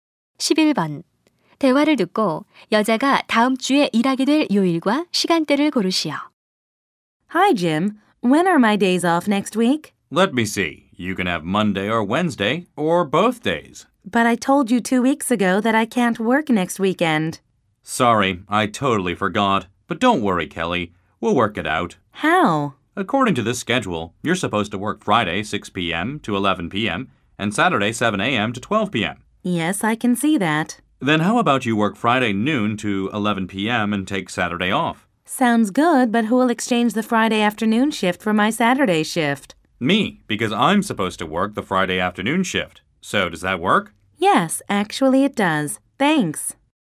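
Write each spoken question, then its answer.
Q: 대화를 듣고 여자가 다음 주에 일하게 될 요일과 시간대를 고르시오.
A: 금요일 정오부터 오후 11시까지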